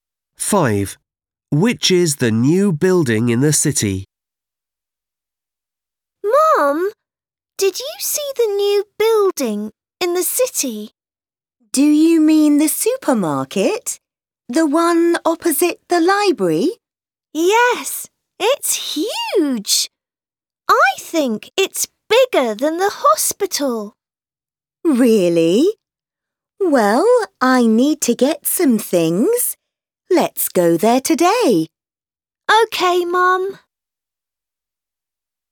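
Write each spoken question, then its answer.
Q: Which is the new building in the city?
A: The supermarket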